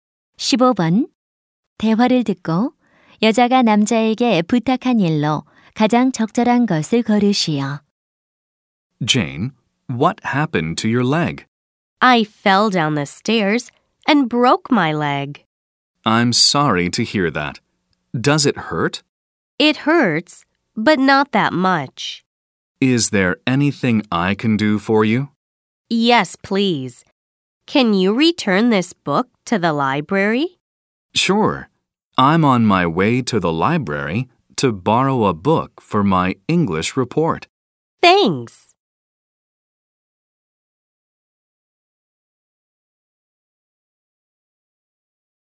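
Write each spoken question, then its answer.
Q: 대화를 듣고 여자가 남자에게 부탁한 일로 가장 적절한 것을 고르시오.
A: 도서관에 책 반납하기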